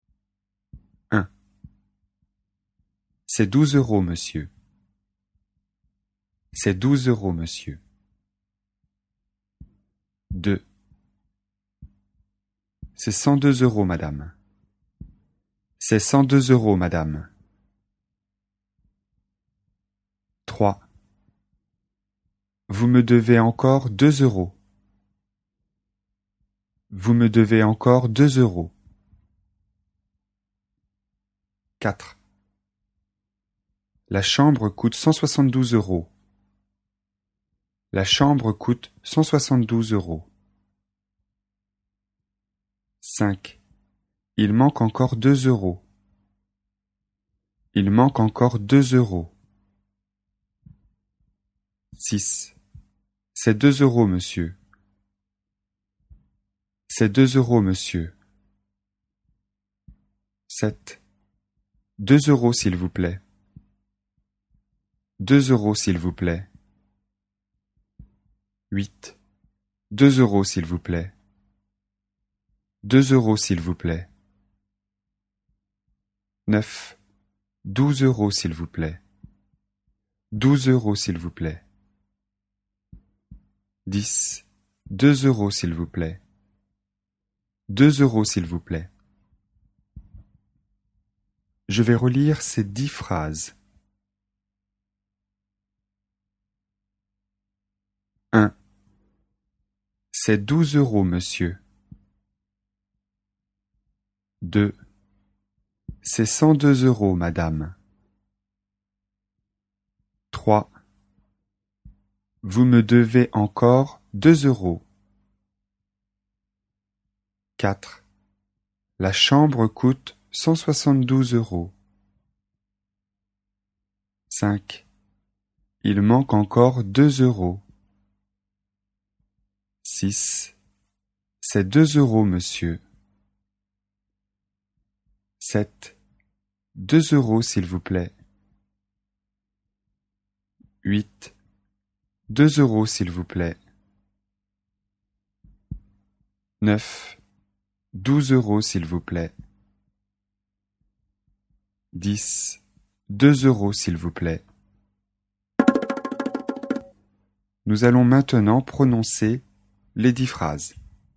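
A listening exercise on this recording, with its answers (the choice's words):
Écoutez et dites si vous entendez "deux" ou "douze".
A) deux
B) douze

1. C'est douze euros monsieur.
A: douze

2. C'est cent deux euros madame.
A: deux

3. Vous me devez encore deux euros.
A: deux

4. La chambre coute 172 euros.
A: douze

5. Il manque encore deux euros.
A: deux

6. C'est deux euros monsieur.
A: deux

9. Douze euros, s'il vous plaît.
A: douze

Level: niveau débutant (A1/A2)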